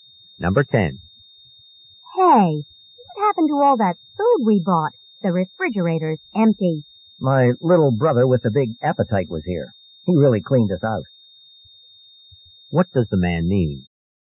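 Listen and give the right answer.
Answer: His brother ate all the food.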